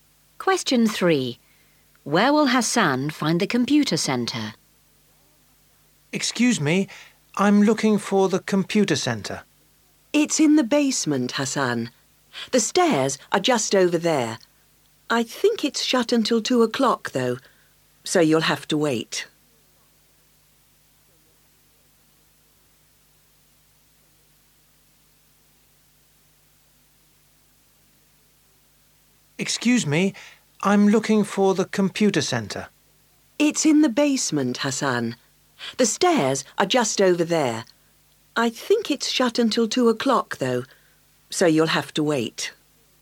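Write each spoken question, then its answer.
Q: Where will Hassan find the computer center?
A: In the basement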